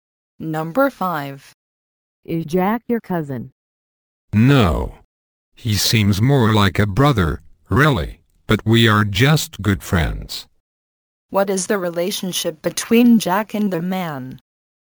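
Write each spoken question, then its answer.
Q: What is the relationship between Jack and the man?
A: They are good friends.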